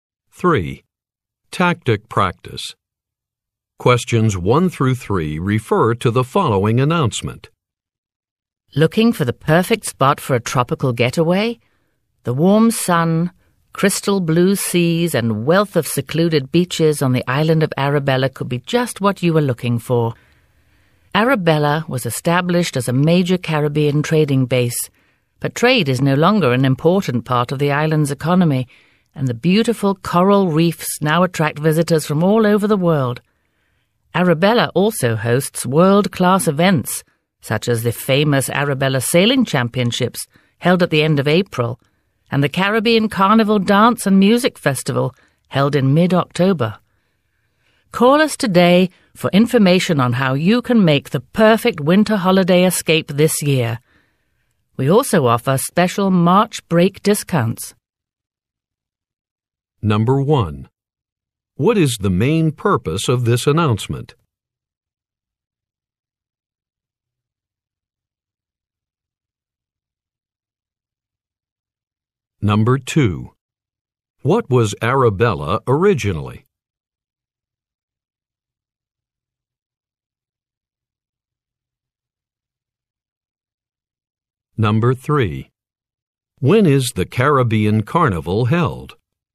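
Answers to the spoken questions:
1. To advertise holidays on the island of Arabella
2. A major Caribbean trading base
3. In mid-October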